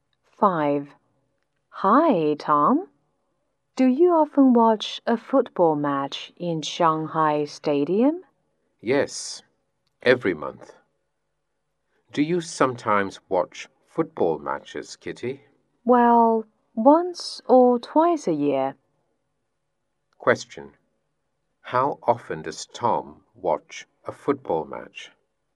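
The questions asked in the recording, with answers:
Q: How often does Tom watch a football match?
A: Every month.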